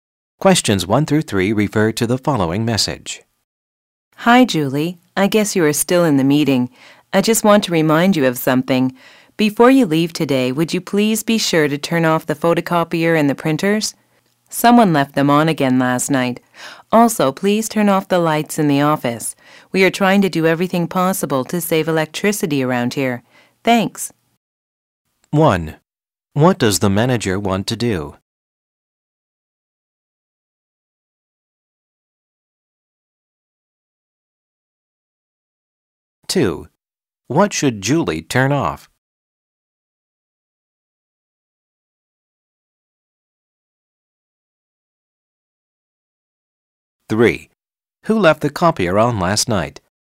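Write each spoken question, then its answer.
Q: What does the manager want to do?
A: Save electricity

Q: What should Julie turn off?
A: The photocopier, printers and office lights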